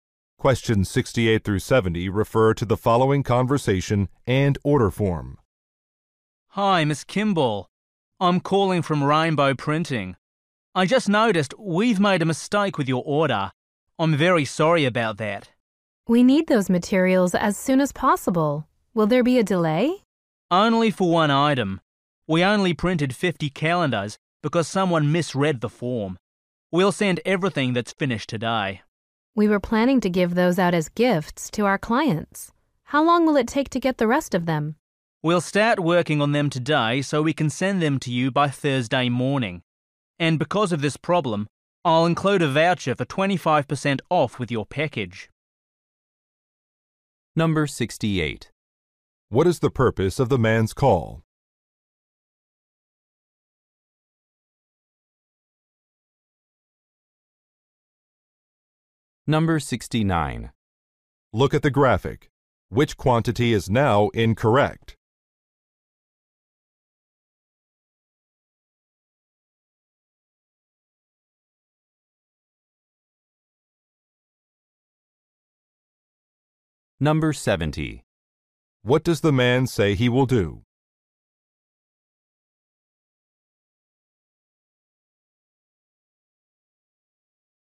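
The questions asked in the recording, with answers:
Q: What is the purpose of the man's call?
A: To report a mistake with her order

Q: What does the man say he will do?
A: Include a 25% off voucher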